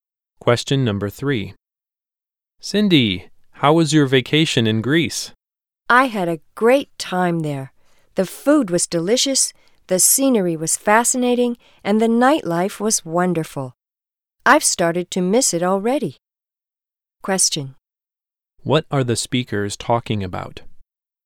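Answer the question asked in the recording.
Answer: Cindy's vacation in Greece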